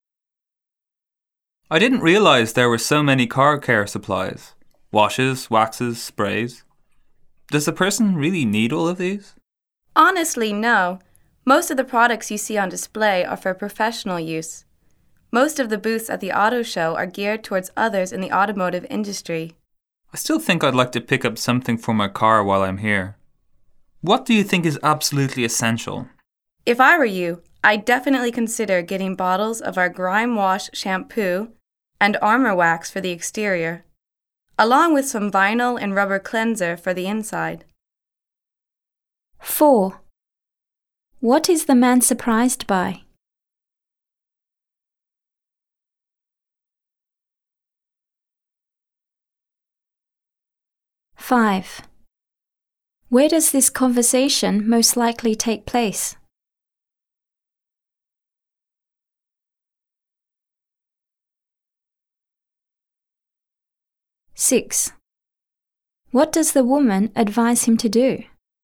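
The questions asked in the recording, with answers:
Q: What is the man surprised by?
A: How many car care supplies there are

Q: Where does this conversation most likely take place?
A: At an auto show

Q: What does the woman advise him to do?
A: Get Grime Wash shampoo, Armor Wax, and vinyl and rubber cleanser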